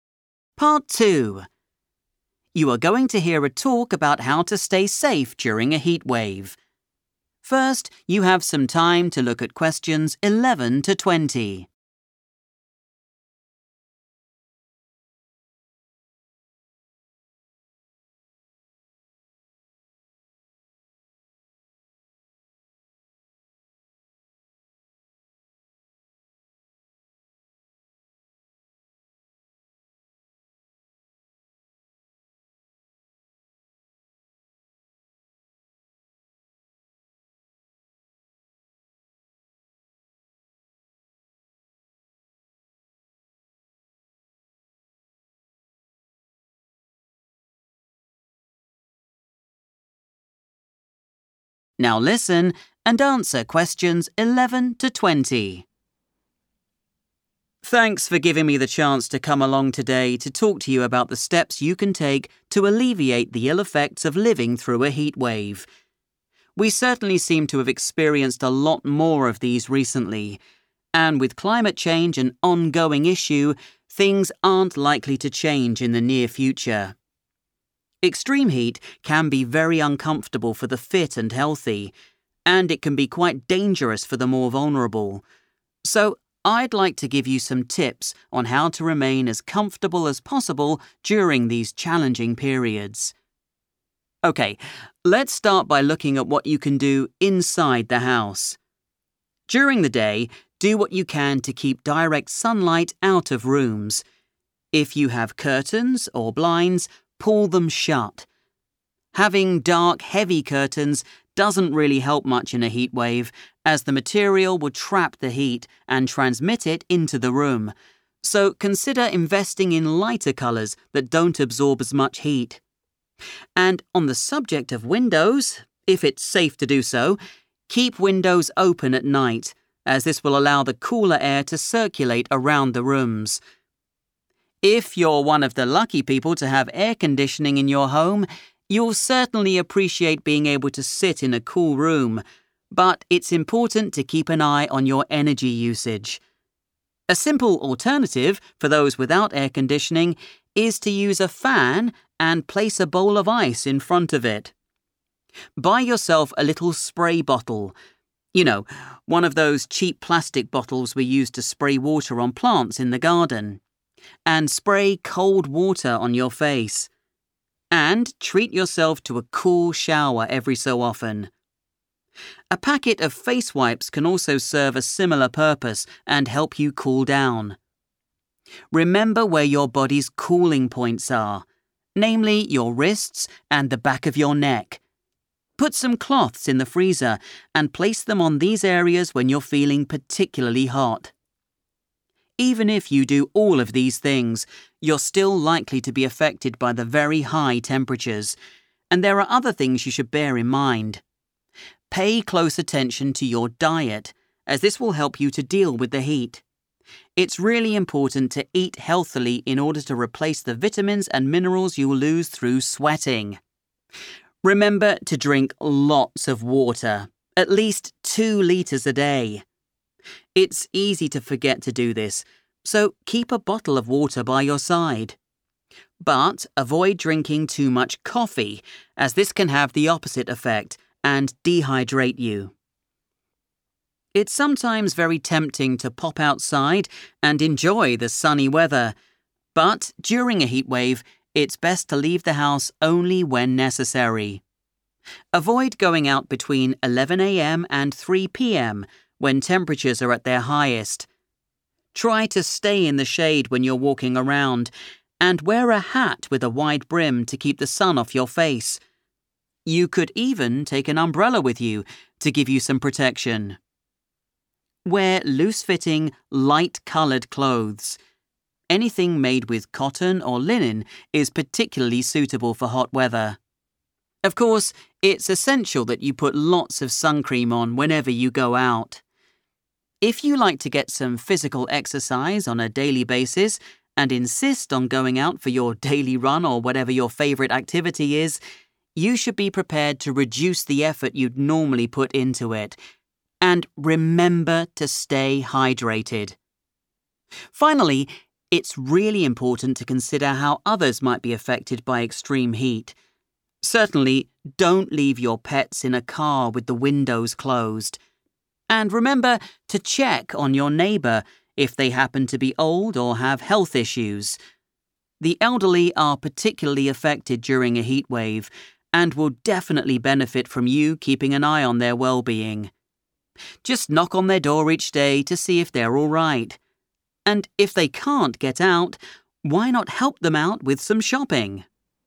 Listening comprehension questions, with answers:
Complete the leaflet below. Write NO MORE THAN THREE WORDS AND/OR A NUMBER for each answer.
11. In the daytime try to limit the amount of _____ in rooms.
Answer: direct sunlight

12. Are you using air conditioning? Pay attention to your _____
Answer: energy usage

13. Spray cold water on your face or take a _____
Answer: cool shower

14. Your wrists and the back of your neck are your body's _____ Place a cold cloth on these areas.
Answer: cooling points

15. Eat a healthy diet to replace the nutrients you lose through _____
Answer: sweating

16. Try to stay at home between 11 a.m. and _____ as this is the hottest part of the day.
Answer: 3 p.m. / 3 pm

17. If you go out in the sun, wear a hat or use an _____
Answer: umbrella

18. Wear loose-fitting clothes made from _____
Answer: cotton or linen

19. Take it easy when doing any _____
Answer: physical exercise

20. Remember your neighbours, especially if they are elderly or have _____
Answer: health issues

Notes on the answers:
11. The correct answer is found in the part of the talk about staying cool inside your home. The speaker mentions that you should stop the sun's rays from entering your rooms during the day. This helps keep the house from getting too hot.
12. The correct answer is "energy usage" because the speaker advises people with air conditioning to "keep an eye on" it. Exercises like this often use synonyms, and the phrase "keep an eye on" means the same thing as "pay attention to" from the leaflet text.
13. The correct answer is chosen because the speaker provides several methods to lower your body temperature while indoors. Along with using a spray bottle with cold water, the speaker suggests taking a 'cool shower' as a way to stay comfortable. Keywords in the text like 'spray cold water' and 'cool down' relate directly to the instructions in the leaflet.
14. The correct answer is identified directly from the transcript where the speaker talks about staying cool. The speaker mentions that the wrists and the back of the neck are keys to lowering body heat. Highlighting these spots, the speaker calls them "cooling points" and suggests placing cold cloths there.
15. The correct answer is sweating because the speaker explains that a healthy diet is necessary to get back the vitamins and minerals (nutrients) that leave the body when a person sweats. In English, losing vitamins and minerals through sweating is a common way to describe the effect of extreme heat on the body.
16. The correct answer is based on the speaker's advice to stay indoors when the heat is most intense. The speaker mentions that the highest temperatures occur during this specific time window, so it is safer to stay home then. The phrases 'temperatures are at their highest' and 'hottest part of the day' carry the same meaning.
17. The correct answer is "umbrella" because the speaker suggests several ways to stay safe when you must leave the house in high temperatures. They recommend staying in the shade, wearing a hat, and specifically suggest taking an umbrella as another way to get protection from the sun.
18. The correct answer is 'cotton or linen' because the speaker advises wearing loose, light clothes during a heatwave and specifically identifies these two materials as being very good for hot weather.
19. The correct answer is physical exercise because the speaker mentions that if you want to continue your regular workout routine during a heatwave, you must "reduce the effort." This means you should not push yourself as hard as usual, or in other words, you should "take it easy" while exercising.
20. The correct answer is based on the speaker's advice to look after people living nearby. The speaker says to check on neighbors who are old or those who have medical problems because they might need help during a heatwave. Keywords like 'neighbour' and 'old' point to this part of the talk.

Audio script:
Speaker: Thanks for giving me the chance to come along today to talk to you about the steps you can take to alleviate the ill effects of living through a heatwave. We certainly seem to have experienced a lot more of these recently, and with climate change an ongoing issue, things aren't likely to change in the near future. Extreme heat can be very uncomfortable for the fit and healthy and it can be quite dangerous for the more vulnerable. So, I'd like to give you some tips on how to remain as comfortable as possible during these challenging periods.
OK, let's start by looking at what you can do inside the house. During the day, do what you can to keep direct sunlight out of rooms. If you have curtains or blinds, pull them shut. Having dark heavy curtains doesn't really help much in a heatwave as the material will trap the heat and transmit it into the room, so consider investing in lighter colours that don't absorb as much heat. And on the subject of windows, if it's safe to do so, keep windows open at night as this will allow the cooler air to circulate around the rooms. If you're one of the lucky people to have air conditioning in your home, you'll certainly appreciate being able to sit in a cool room but it's important to keep an eye on your energy usage. A simple alternative for those without air conditioning is to use a fan and place a bowl of ice in front of it. Buy yourself a little spray bottle, you know, one of those cheap plastic bottles we use to spray water on plants in the garden, and spray cold water on your face. And treat yourself to a cool shower every so often. A packet of face wipes can also serve a similar purpose and help you cool down. Remember where your body's cooling points are, namely your wrists and the back of your neck. Put some cloths in the freezer and place them on these areas when you're feeling particularly hot.
Even if you do all of these things, you're still likely to be affected by the very high temperatures, and there are other things you should bear in mind. Pay close attention to your diet as this will help you to deal with the heat. It's really important to eat healthily in order to replace the vitamins and minerals you'll lose through sweating. Remember to drink lots of water, at least two litres a day. It's easy to forget to do this so keep a bottle of water by your side. But avoid drinking too much coffee as this can have the opposite effect and dehydrate you.
It's sometimes very tempting to pop outside and enjoy the sunny weather but during a heatwave it's best to leave the house only when necessary. Avoid going out between 11 a.m. and 3 p.m., when temperatures are at their highest. Try to stay in the shade when you're walking around and wear a hat with a wide brim to keep the sun off your face. You could even take an umbrella with you to give you some protection. Wear loose-fitting, light-coloured clothes. Anything made with cotton or linen is particularly suitable for hot weather. Of course, it's essential that you put lots of sun cream on whenever you go out. If you like to get some physical exercise on a daily basis and insist on going out for your daily run or whatever your favourite activity is, you should be prepared to reduce the effort you'd normally put into it. And remember to stay hydrated.
Finally, it's really important to consider how others might be affected by extreme heat. Certainly, don't leave your pets in a car with the windows closed. And remember to check on your neighbour if they happen to be old or have health issues. The elderly are particularly affected during a heatwave and will definitely benefit from you keeping an eye on their well-being. Just knock on their door each day to see if they're all right. And if they can't get out, why not help them out with some shopping?